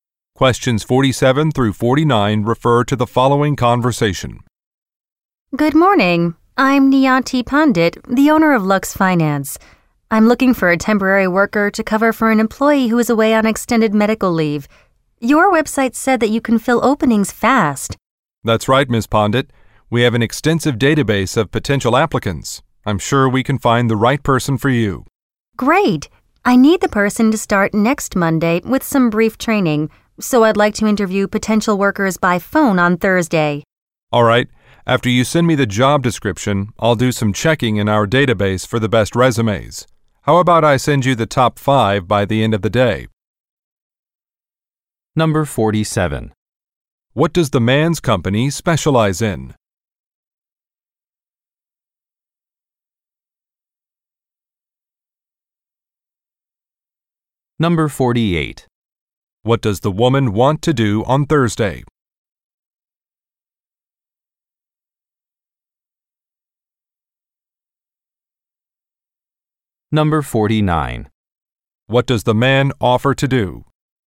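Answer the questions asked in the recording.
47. Providing temporary workers
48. Interview applicants by phone
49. Send the top 5 resumes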